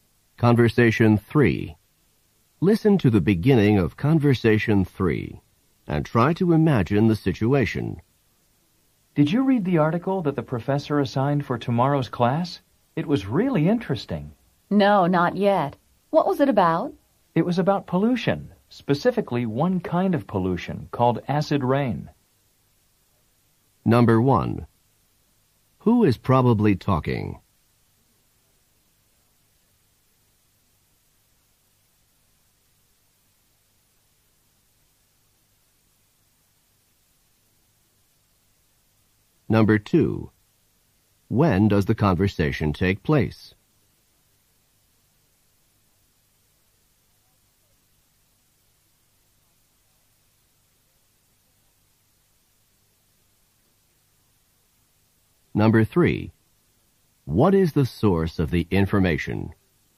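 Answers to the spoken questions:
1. Two students in the same class
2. The day before the class
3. An article the professor assigned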